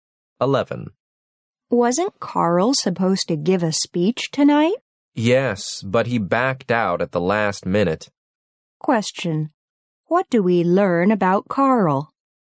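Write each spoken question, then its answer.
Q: What do we learn about Carl?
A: He withdrew from giving the speech at the last minute.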